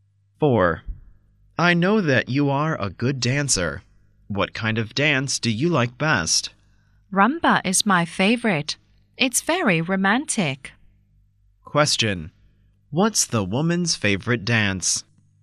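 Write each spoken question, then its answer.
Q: What's the woman's favorite dance?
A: Rumba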